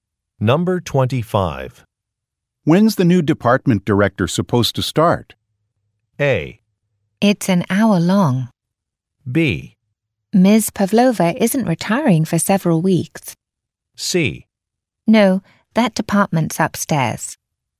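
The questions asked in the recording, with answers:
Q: When's the new department director supposed to start?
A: B: Ms. Pavlova isn't retiring for several weeks.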